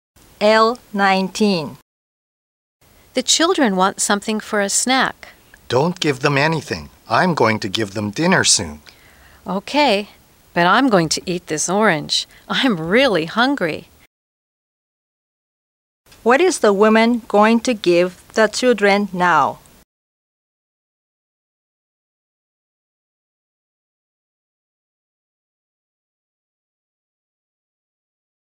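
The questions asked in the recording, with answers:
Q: What is the woman going to give the children now?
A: Nothing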